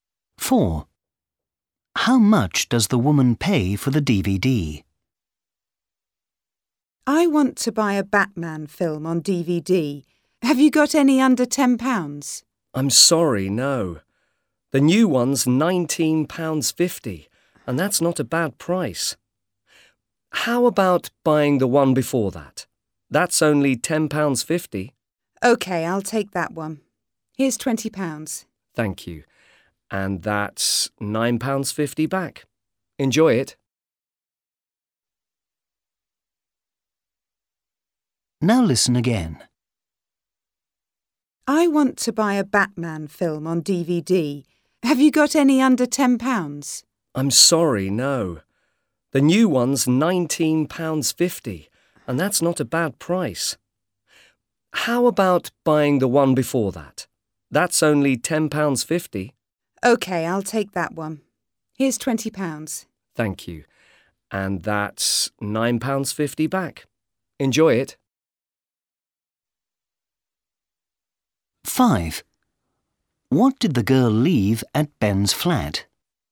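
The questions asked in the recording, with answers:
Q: How much does the woman pay for the DVD?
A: £10.50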